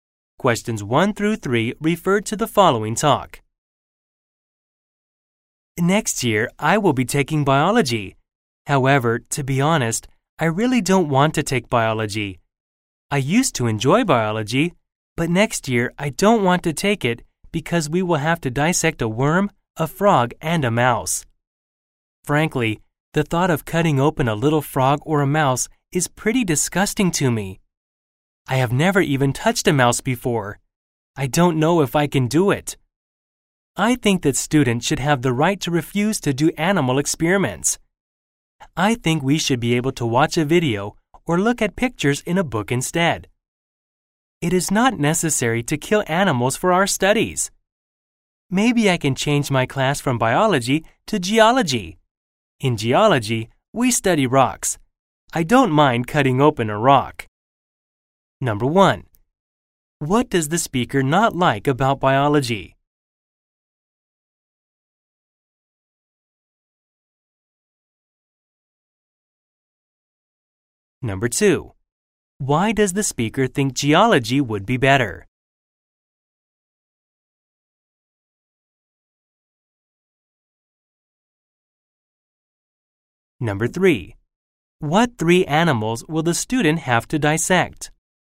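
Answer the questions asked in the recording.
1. Having to dissect animals
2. Because they study rocks and don't have to cut open animals
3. A worm, a frog, and a mouse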